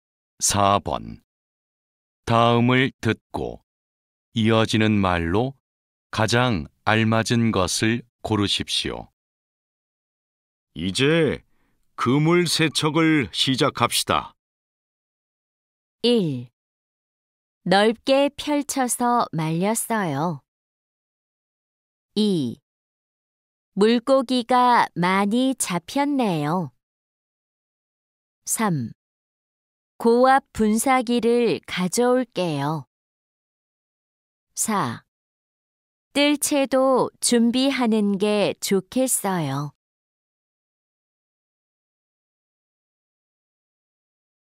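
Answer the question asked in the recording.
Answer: 3: 고압 분사기를 가져올게요.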